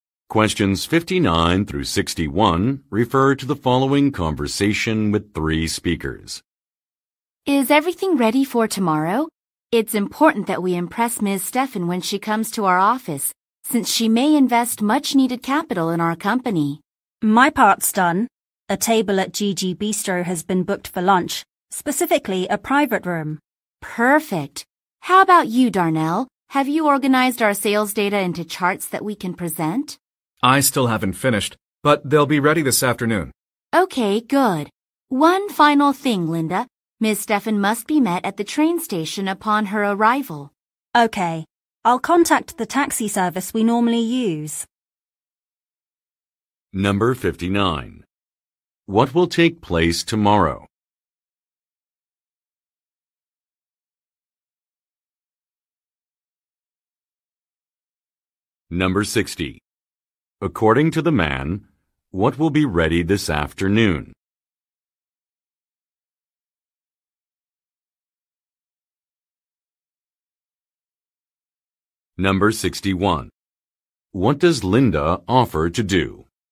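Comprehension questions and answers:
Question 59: What will take place tomorrow?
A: A business visit

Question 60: According to the man, what will be ready this afternoon?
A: Some visual materials

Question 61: What does Linda offer to do?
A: Arrange a ride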